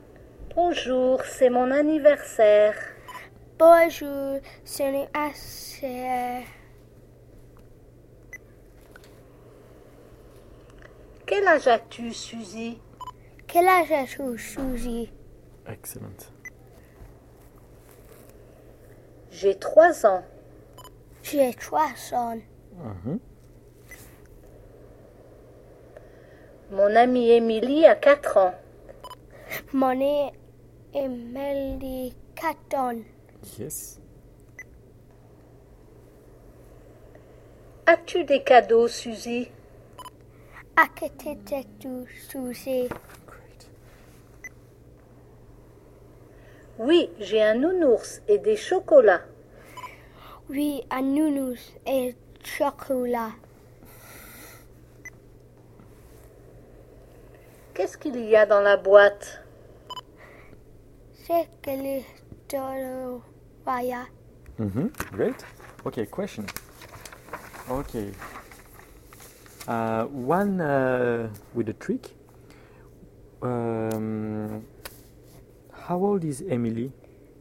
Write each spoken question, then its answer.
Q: How old is Emily?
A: Susie is 3, but Emily is 4.